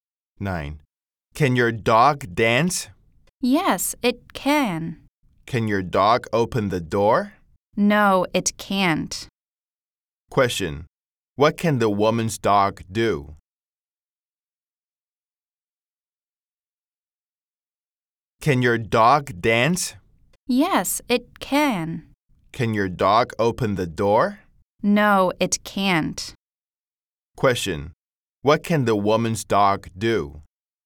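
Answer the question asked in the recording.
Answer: It can dance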